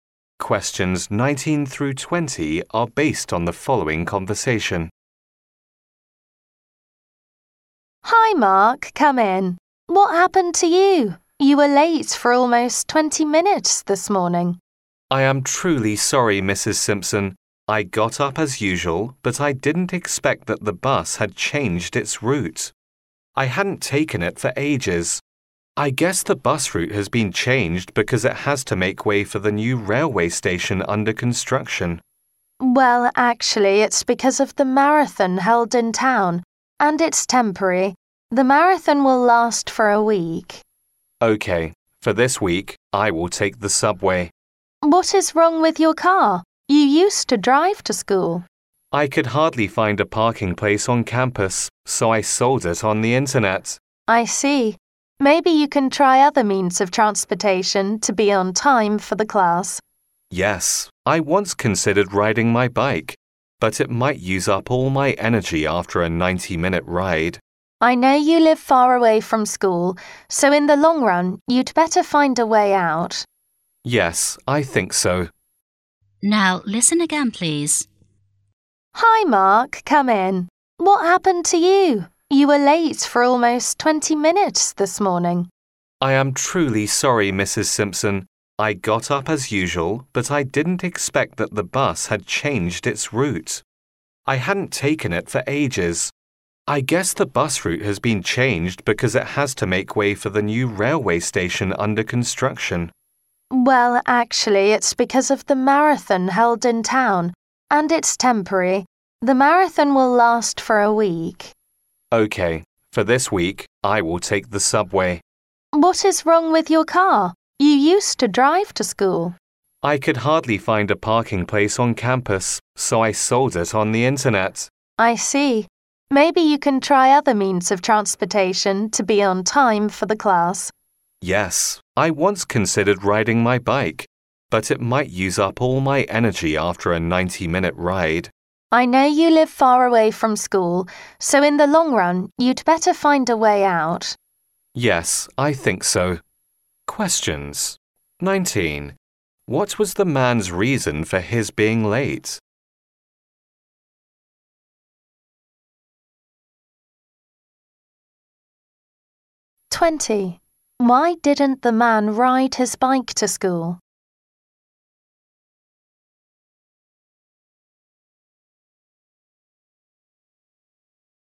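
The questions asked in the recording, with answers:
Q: What was the man's reason for his being late?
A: The bus had changed its route

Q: Why didn't the man ride his bike to school?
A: The 90-minute ride would use up all his energy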